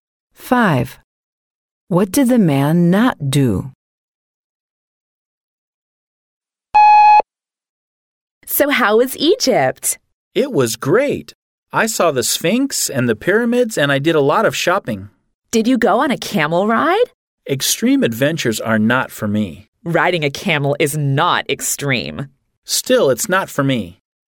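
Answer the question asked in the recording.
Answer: He did not go on a camel ride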